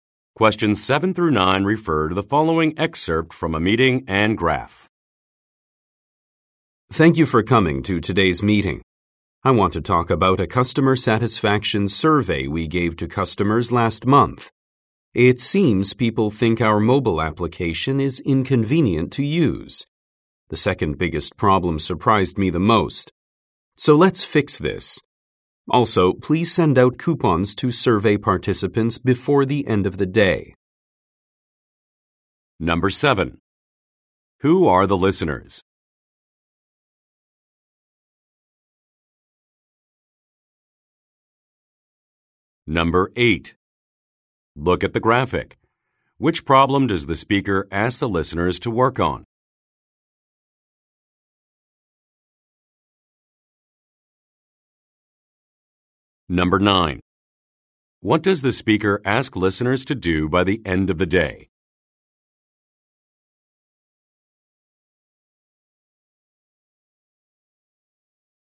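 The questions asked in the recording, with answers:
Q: What does the speaker ask listeners to do by the end of the day?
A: Send coupons to survey participants.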